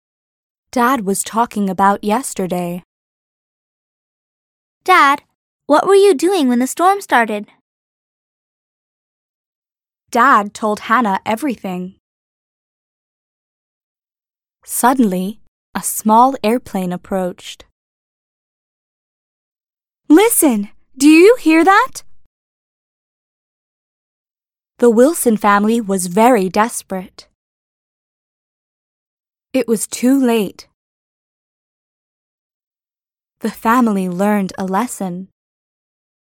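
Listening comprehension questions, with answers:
«باتوجه به فایل صوتی جملات را مرتب کنید»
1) Dad was talking about yesterday.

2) Dad, what were you doing when the storm started?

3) Dad told Hannah everything.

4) Suddenly a small airplane approached.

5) Listen! Do you hear that?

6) The Wilson family was very desperate.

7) It was too late.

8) The family learned a lesson.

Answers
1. 1
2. 2
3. 3
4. 4
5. 5
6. 6
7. 7
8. 8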